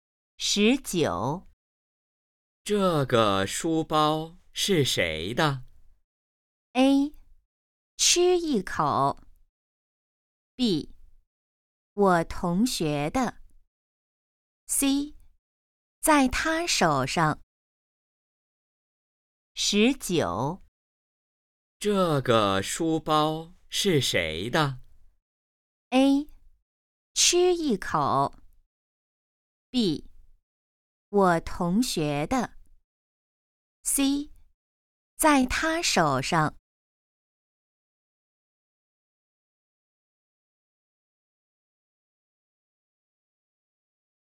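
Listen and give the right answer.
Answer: B: 我同学的。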